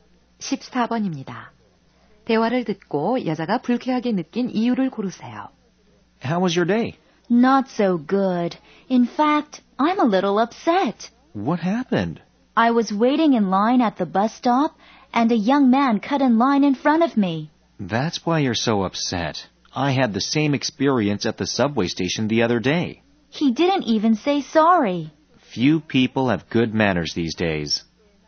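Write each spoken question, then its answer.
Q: 대화를 듣고 여자가 불쾌하게 느낀 이유를 고르세요.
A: 버스 정류장에서 한 젊은 남자가 새치기를 해서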